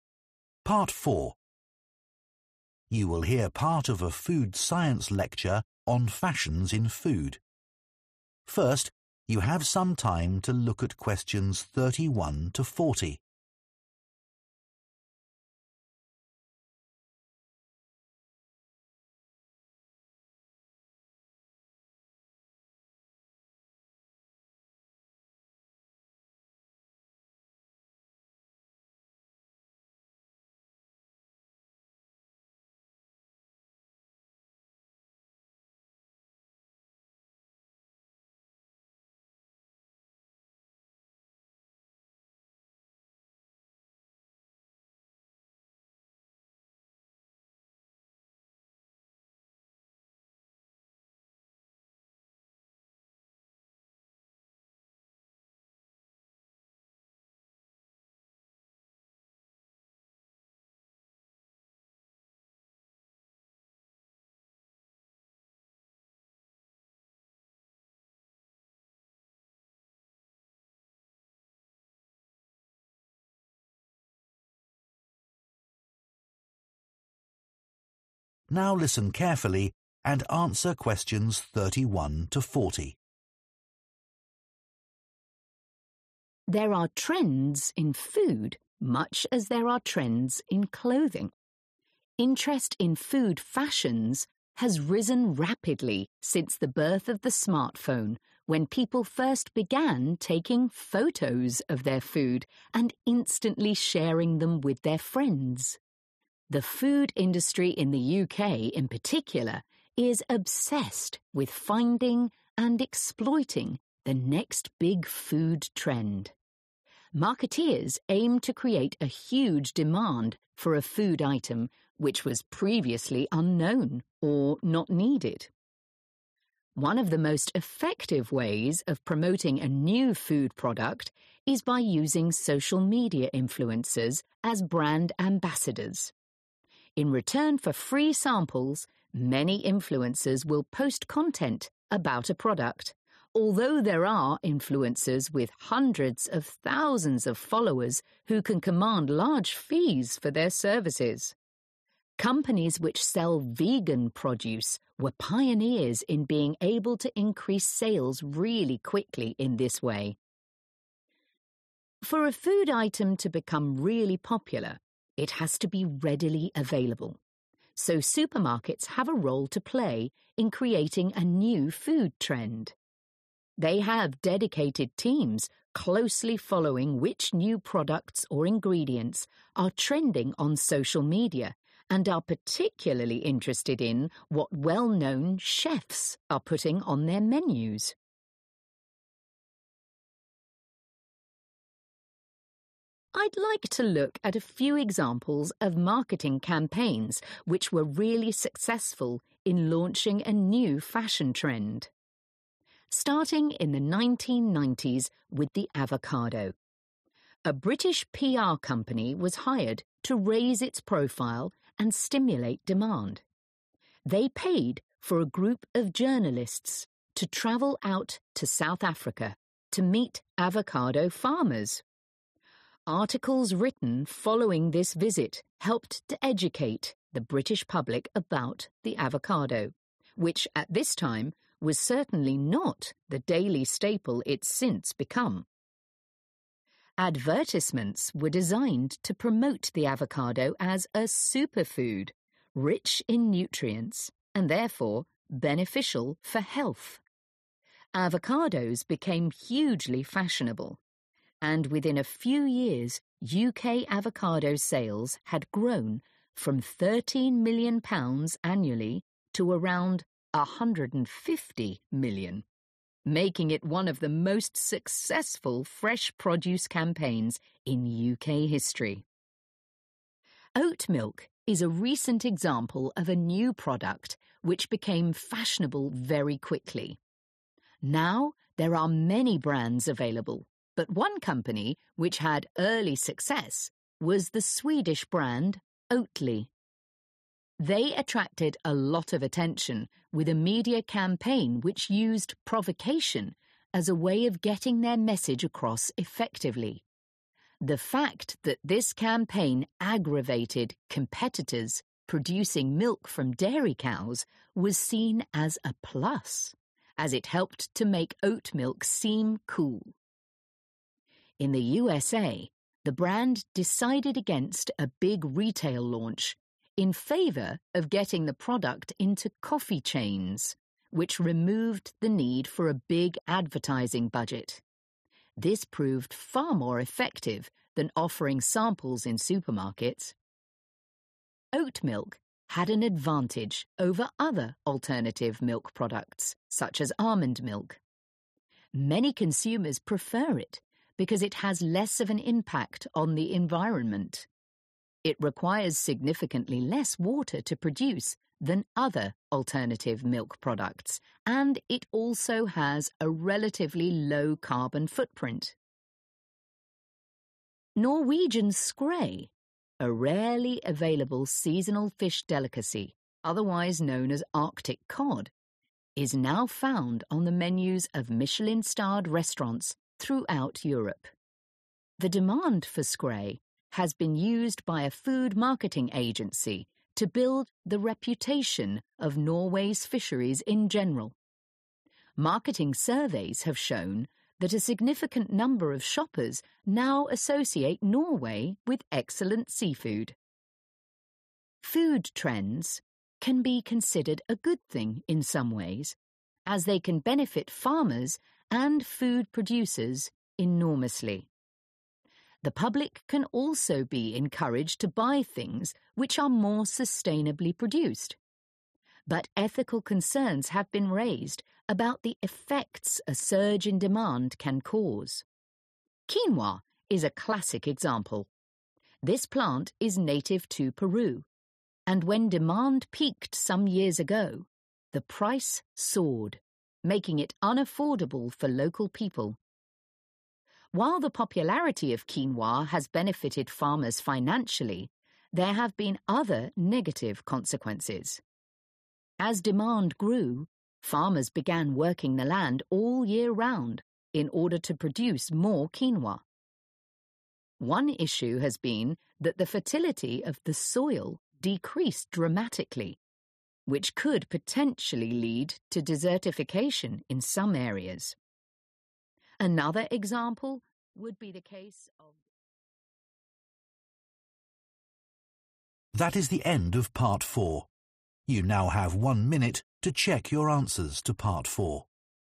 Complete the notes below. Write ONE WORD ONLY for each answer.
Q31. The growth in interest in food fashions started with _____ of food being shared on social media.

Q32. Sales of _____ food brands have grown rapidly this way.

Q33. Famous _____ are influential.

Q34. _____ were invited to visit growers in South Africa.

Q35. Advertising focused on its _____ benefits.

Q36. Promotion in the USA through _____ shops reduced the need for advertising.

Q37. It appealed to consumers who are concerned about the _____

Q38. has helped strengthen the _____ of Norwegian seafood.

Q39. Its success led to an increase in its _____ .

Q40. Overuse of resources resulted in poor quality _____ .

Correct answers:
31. Photos / Photographs / Pictures
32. Vegan
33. Chefs / Cooks
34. Journalists / Reporters
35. Health
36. Coffee
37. Environment
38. Reputation
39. Price / Cost
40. Soil

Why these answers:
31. The correct answer is 'photos' because the transcript mentions that interest in food fashions grew when people started taking photos of their food and sharing them on social media. This shows how sharing 'photos' helped grow interest in food.
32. The correct answer is 'Vegan' because the transcript talks about how brands that sell vegan food became very successful by using social media influencers. These influencers helped to increase interest and sales of vegan products, making vegan food more popular in the market.
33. The correct answer is 'chefs' because the transcript says that supermarkets pay attention to what well-known chefs are putting on their menus. This indicates that famous chefs influence food trends, making their choices important for new products.
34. The correct answer is 'journalists' because the transcript states that a British PR company paid for a group of journalists to travel to South Africa to meet avocado farmers. This helped to raise the profile of avocados by having these journalists write articles about them.
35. The correct answer is 'Health' because the transcript mentions that the advertising for avocados was designed to promote them as a superfood, which means they are very good for health. This is why 'health' is the right word to fill in the blank about the benefits of avocados.
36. The correct answer is 'Coffee' because the transcript explains that the brand Oatly decided to promote oat milk by placing it in coffee shops rather than using a big advertising budget. This was more effective for increasing its popularity.
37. The correct answer is 'environment' because the information in the transcript explains that oat milk is popular among people who care about the impact of food production on the earth. The transcript mentions that oat milk has less environmental impact compared to other types of milk, which is why people who think about the environment prefer it.
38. The correct answer is 'reputation' because the transcript mentions that the marketing for Norwegian skrei has helped to build the reputation of Norway's fisheries. This means that people now think better about Norway's seafood because of the marketing efforts.
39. The correct answer is 'price' because when quinoa became very popular, its 'price' increased a lot. This meant that local people in Peru could not afford it anymore. The text mentions that the popularity of quinoa helped farmers make money, but it also caused problems for the people who needed it most. So, the increase in demand caused the 'price' to go up.
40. The correct answer is 'soil' because the transcript explains that due to the increasing demand for quinoa, farmers started working the land all year long, which caused the quality of the soil to become worse. This is important because it shows how a high demand for a food can have negative effects on the resources used to grow it.

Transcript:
There are trends in food much as there are trends in clothing. Interest in food fashions has risen rapidly since the birth of the smartphone when people first began taking photos of their food and instantly sharing them with their friends. The food industry in the UK in particular is obsessed with finding and exploiting the next big food trend. Marketeers aim to create a huge demand for a food item which was previously unknown or not needed. One of the most effective ways of promoting a new food product is by using social media influencers as brand ambassadors In return for free samples many influencers will post content about a product although there are influencers with hundreds of thousands of followers who can command large fees for their services Companies which sell vegan produce were pioneers in being able to increase sales really quickly in this way. For a food item to become really popular, it has to be readily available. So supermarkets have a role to play in creating a new food trend. They have dedicated teams closely following which new products or ingredients are trending on social media and are particularly interested in what well-known chefs are putting on their menus. I'd like to look at a few examples of marketing campaigns which were really successful in launching a new fashion trend. Starting in the 1990s with the avocado. A British PR company was hired to raise its profile and stimulate demand. They paid for a group of journalists to travel out to South Africa to meet avocado farmers. Articles written following this visit helped to educate the British public about the avocado, which at this time was certainly not the daily staple it's since become. Advertisements were designed to promote the avocado as a superfood, rich in nutrients and therefore beneficial for health. Avocados became hugely fashionable, and within a few years UK avocado sales had grown from £13 million annually to around £150 million, making it one of the most successful fresh produce campaigns in UK history. Oat milk is a recent example of a new product which became fashionable very quickly. Now there are many brands available but one company which had early success was the Swedish brand Oatly They attracted a lot of attention with a media campaign which used provocation as a way of getting their message across effectively. The fact that this campaign aggravated competitors producing milk from dairy cows was seen as a plus, as it helped to make oat milk seem cool. In the USA, the brand decided against a big retail launch in favour of getting the product into coffee chains, which removed the need for a big advertising budget. This proved far more effective than offering samples in supermarkets. Oat milk had an advantage over other alternative milk products, such as almond milk. Many consumers prefer it because it has less of an impact on the environment. It requires significantly less water to produce than other alternative milk products and it also has a relatively low carbon footprint. Norwegian scray, a rarely available seasonal fish delicacy, otherwise known as Arctic cod, is now found on the menus of Michelin-starred restaurants throughout Europe. The demand for Skre has been used by a food marketing agency to build the reputation of Norway's fisheries in general. Marketing surveys have shown that a significant number of shoppers now associate Norway with excellent seafood. Food trends can be considered a good thing in some ways, as they can benefit farmers and food producers enormously. The public can also be encouraged to buy things which are more sustainably produced. But ethical concerns have been raised about the effects a surge in demand can cause. Quinoa is a classic example. This plant is native to Peru and when demand peaked some years ago, the price soared, making it unaffordable for local people. While the popularity of quinoa has benefited farmers financially there have been other negative consequences. As demand grew, farmers began working the land all year round in order to produce more quinoa. One issue has been that the fertility of the soil decreased dramatically. which could potentially lead to desertification in some areas. Another example would be the case of...